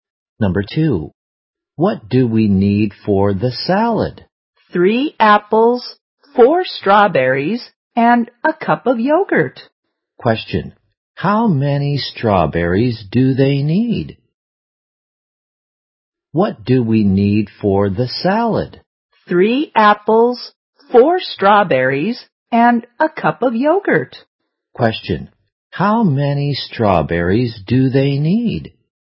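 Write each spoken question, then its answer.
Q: how many strawberries do they need?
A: Four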